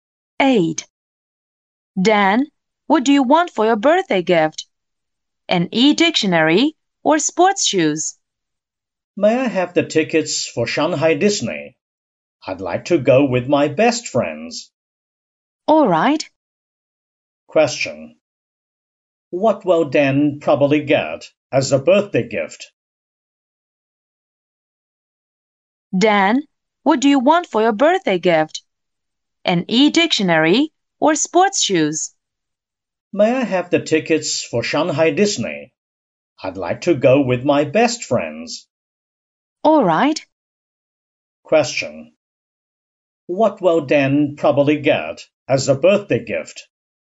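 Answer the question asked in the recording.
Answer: Tickets for Shanghai Disney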